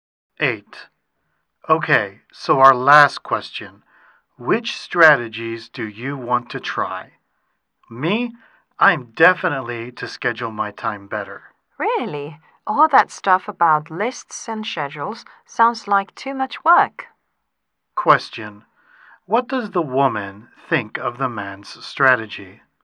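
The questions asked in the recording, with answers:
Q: What does the woman think of the man's strategy?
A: It sounds like too much work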